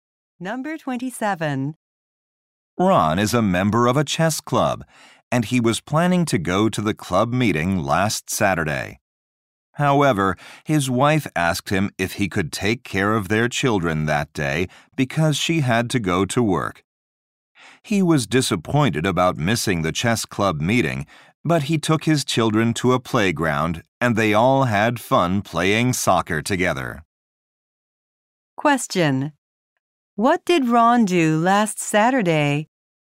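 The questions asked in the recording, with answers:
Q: What did Ron do last Saturday?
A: He took care of his children and played soccer with them.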